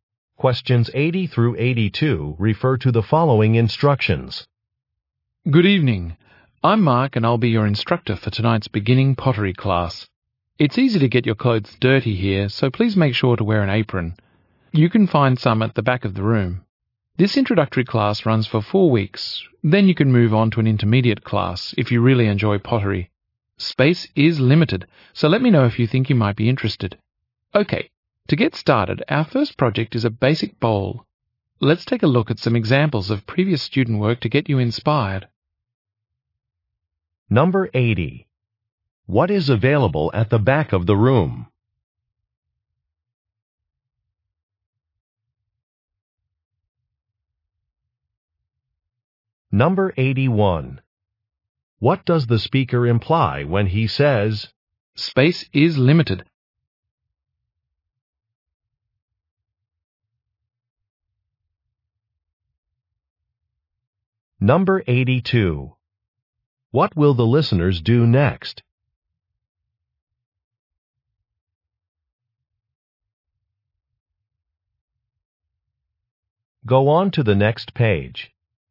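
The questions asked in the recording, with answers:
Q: What is available at the back of the room?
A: Aprons

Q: What does the speaker imply when he says,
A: Interested people should tell him soon about the intermediate class

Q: What will the listeners do next?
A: Look at examples of previous student work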